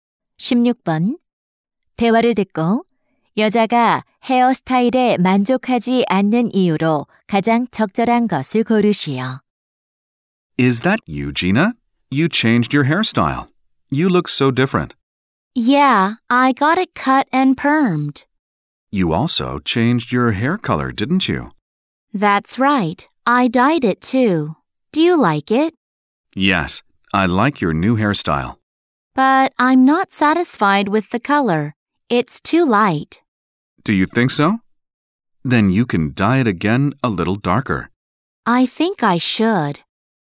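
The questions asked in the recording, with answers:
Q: 대화를 듣고 여자가 헤어스타일에 만족하지 않는 이유로 가장 적절한 것을 고르시오.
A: 머리 색이 너무 밝아서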